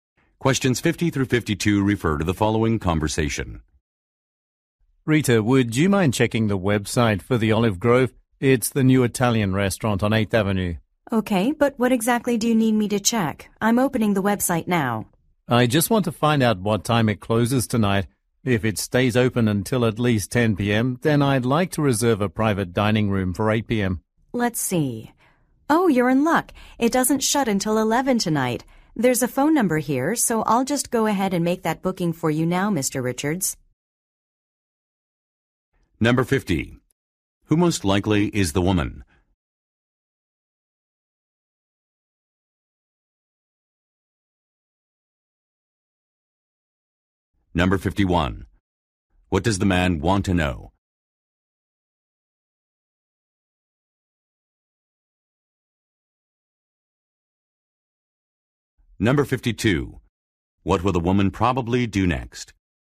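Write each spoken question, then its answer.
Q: What does the man want to know?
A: What time the restaurant closes tonight

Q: What will the woman probably do next?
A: Call the restaurant to make a reservation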